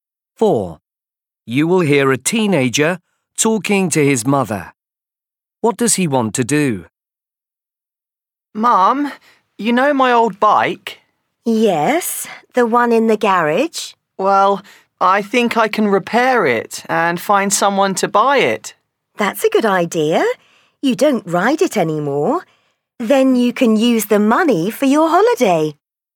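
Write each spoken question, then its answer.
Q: What does he want to do?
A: repair and sell his old bike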